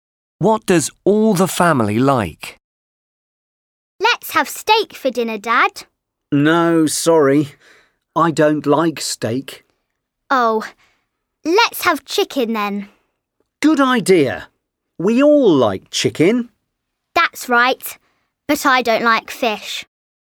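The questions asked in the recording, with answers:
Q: What does all the family like?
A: chicken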